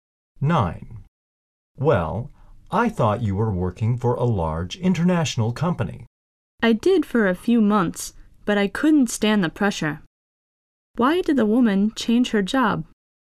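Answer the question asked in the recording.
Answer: She couldn't stand the pressure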